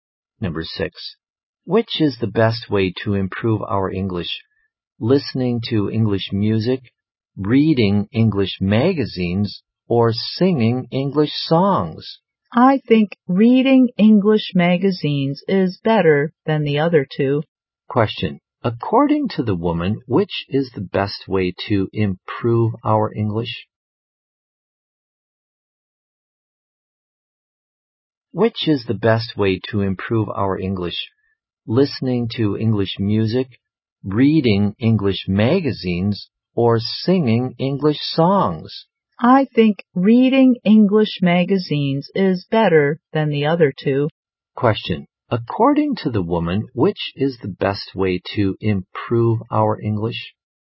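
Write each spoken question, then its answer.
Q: Question. According to the woman, which is the best way to improve our English?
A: Reading English magazines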